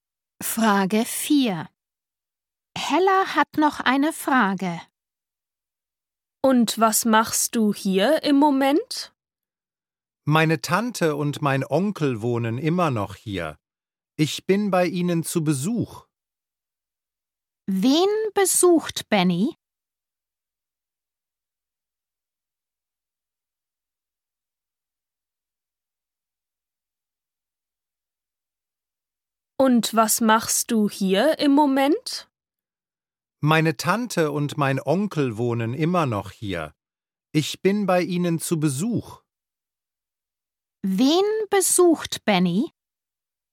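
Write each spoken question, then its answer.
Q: Wen besucht Benny?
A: Seine Tante und seinen Onkel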